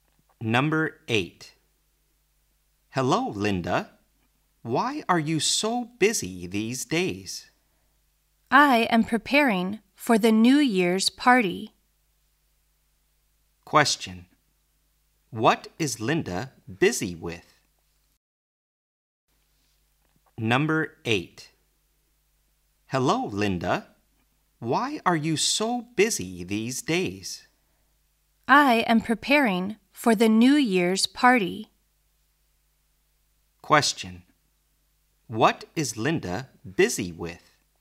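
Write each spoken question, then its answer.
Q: What is Linda busy with?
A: Preparing for the New Year's party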